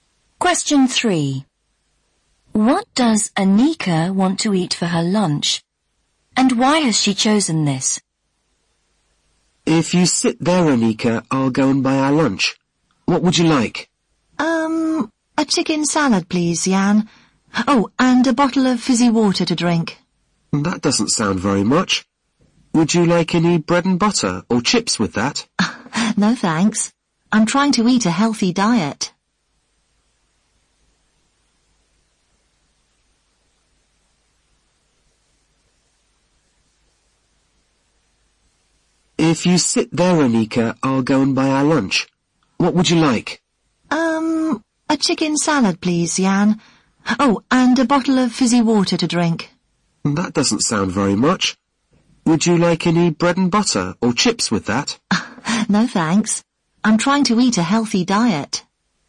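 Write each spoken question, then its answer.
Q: What does Anika want to eat for her lunch? And why has she chosen this?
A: A chicken salad, because she is trying to eat a healthy diet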